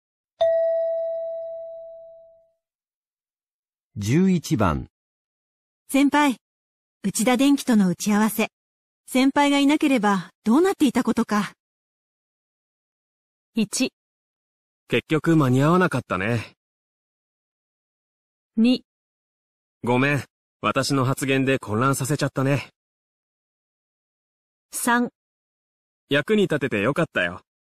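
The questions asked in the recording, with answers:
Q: 内田電機との打ち合わせ。先輩がいなければどうなっていたことか。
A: 3: 役に立ててよかったよ。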